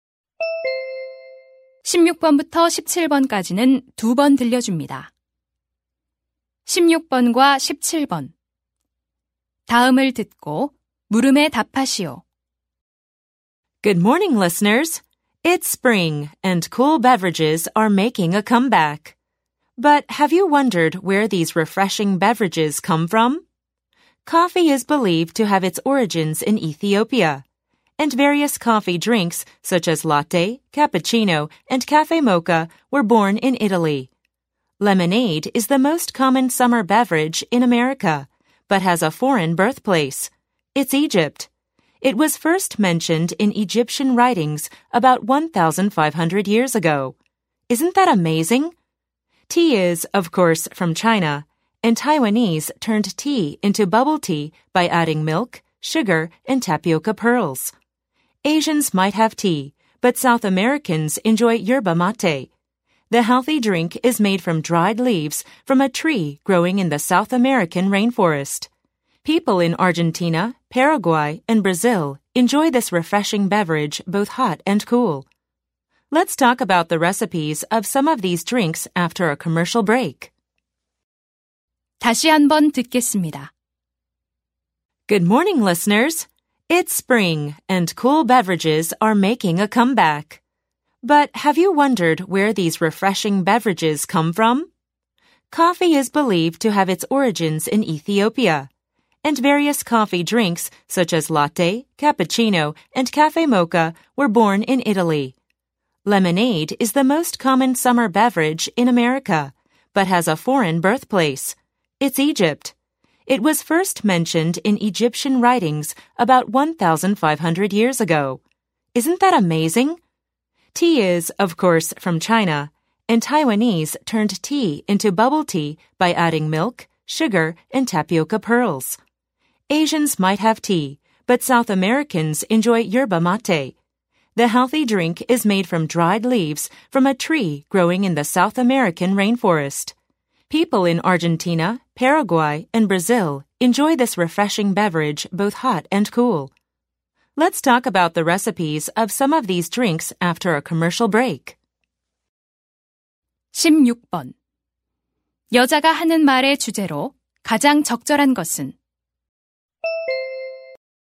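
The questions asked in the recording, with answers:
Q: 여자가 하는 말의 주제로 가장 적절한 것은?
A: 여러 음료의 기원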